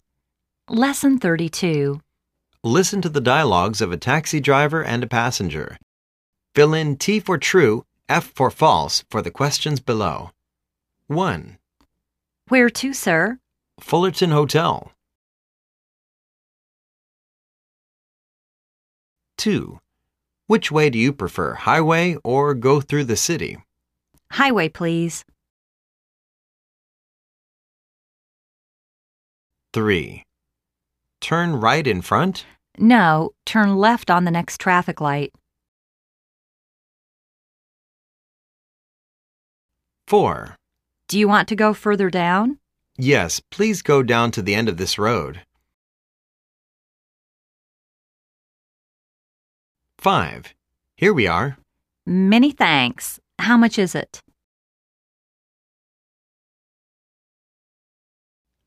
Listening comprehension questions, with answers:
Listen to the dialogues of a taxi driver and a passenger.Fill in T for"True",F for "False" for the questions below.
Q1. The passenger is going to the airport.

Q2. The passenger wants to go on the high street.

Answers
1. F
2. F